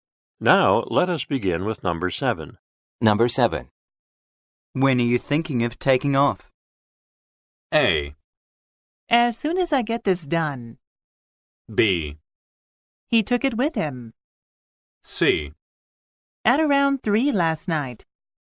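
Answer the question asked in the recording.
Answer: A: As soon as I get this done.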